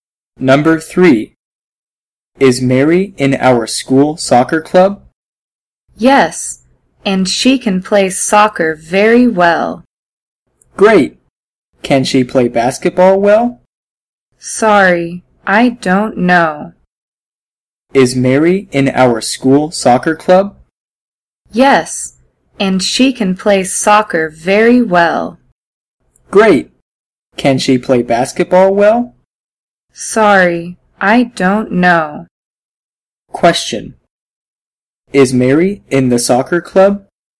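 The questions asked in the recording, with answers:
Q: Is Mary in the soccer club?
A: Yes, she is.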